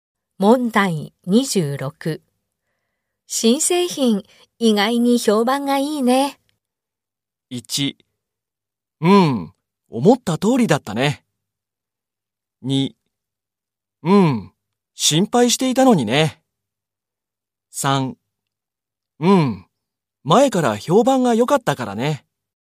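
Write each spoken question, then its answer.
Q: 新製品、意外に評判がいいね。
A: 2: 心配していたのにね。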